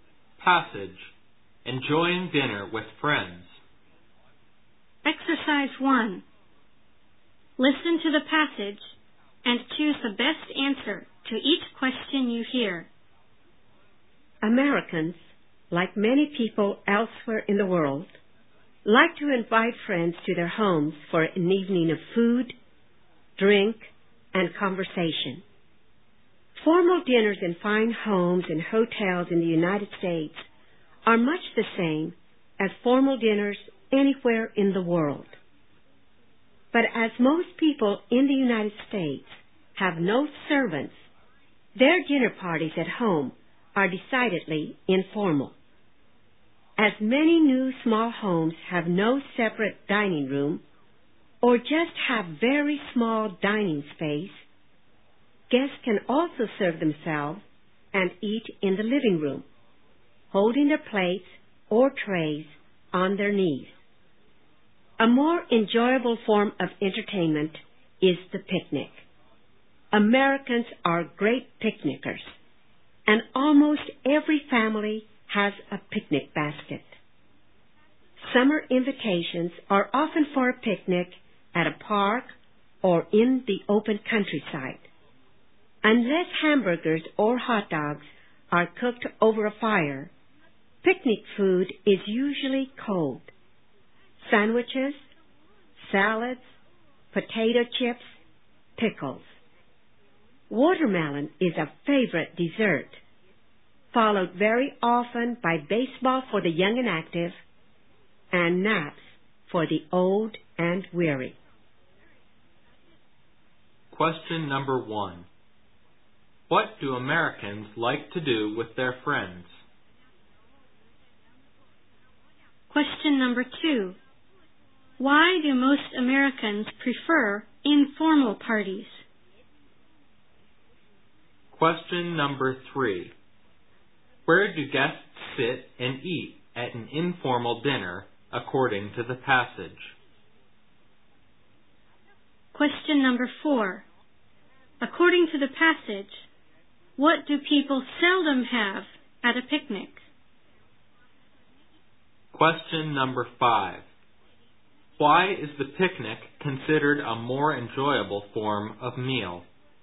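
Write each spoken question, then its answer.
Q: What do Americans like to do with their friends?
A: Invite them home for an evening of food, drink and conversation

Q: Why do most Americans prefer informal parties?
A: Because most have no servants

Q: Where do guests sit and eat at an informal dinner, according to the passage?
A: In the living room, holding plates or trays on their knees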